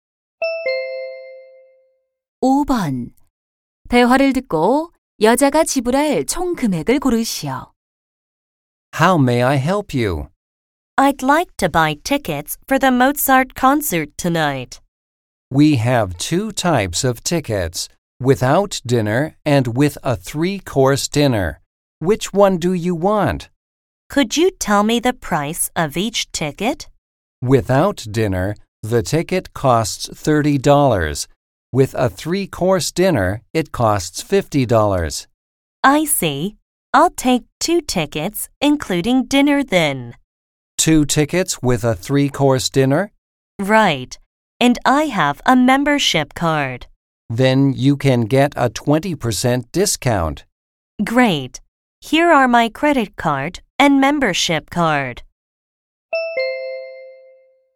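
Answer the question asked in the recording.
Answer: $80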